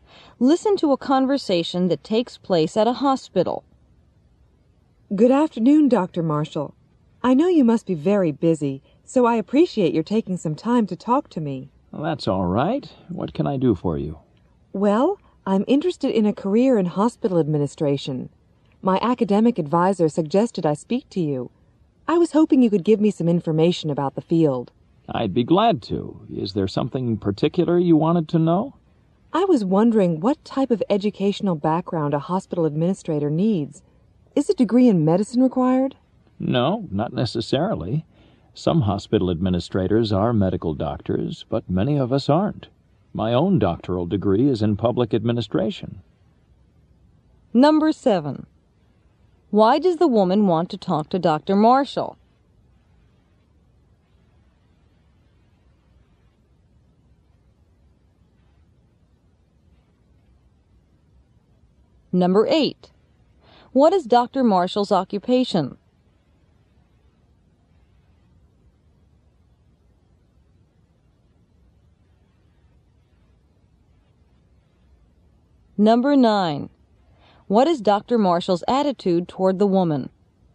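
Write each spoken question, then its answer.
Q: Why does the woman want to talk to Dr. Marshall?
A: To get information about a career in hospital administration

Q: What is Dr. Marshall's occupation?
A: Hospital administrator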